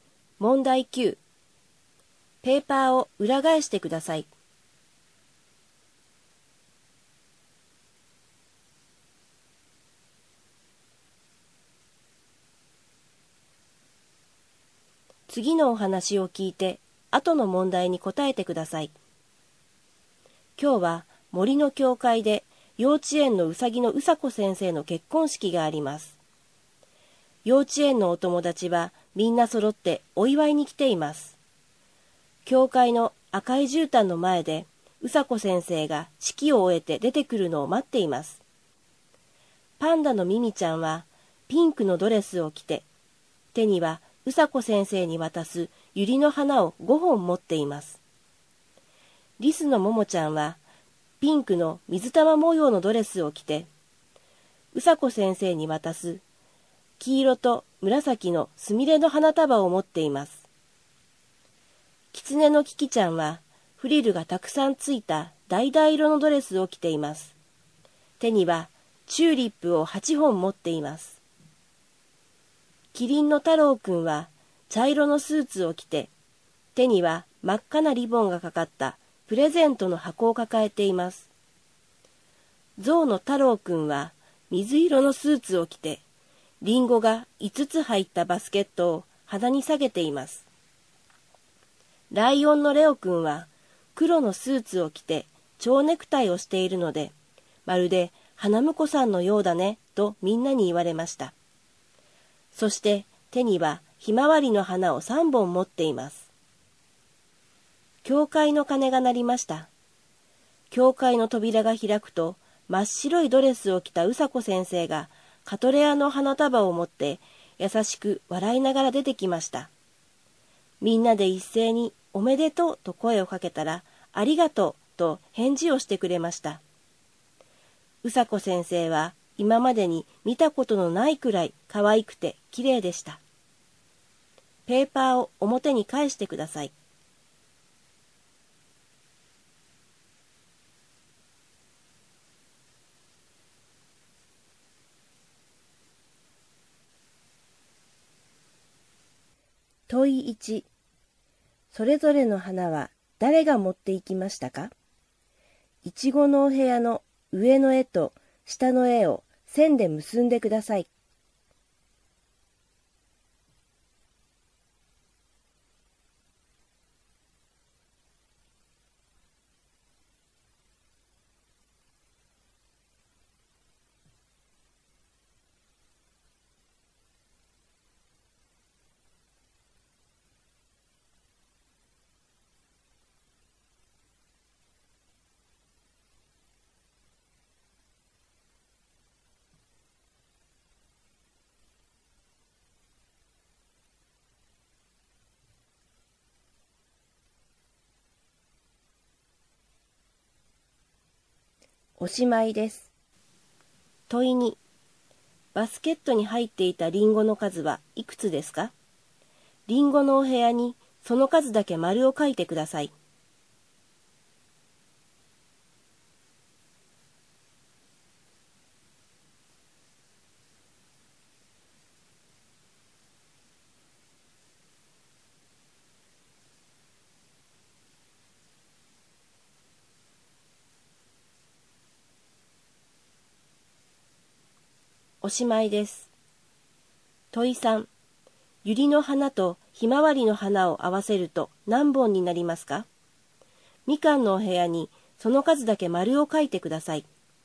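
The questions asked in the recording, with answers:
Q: バスケットに入っていたリンゴの数はいくつですか?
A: 5つ

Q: ユリの花とひまわりの花を合わせると何本になりますか?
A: 8本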